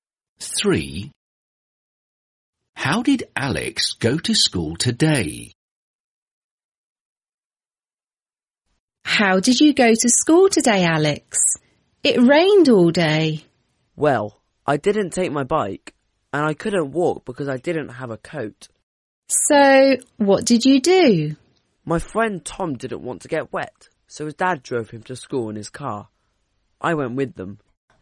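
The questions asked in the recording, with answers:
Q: How did Alex go to school today?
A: By car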